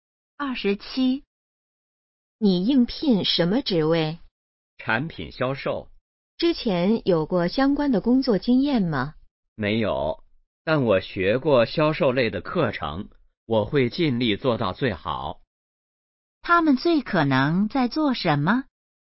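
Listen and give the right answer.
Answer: 面试(应聘)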